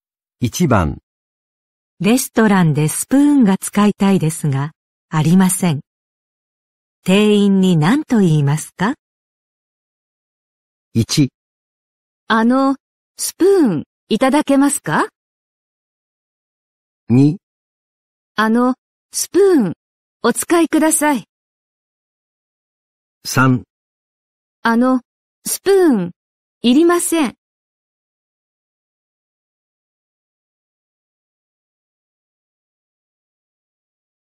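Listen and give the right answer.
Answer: 1: スプーンいただけますか?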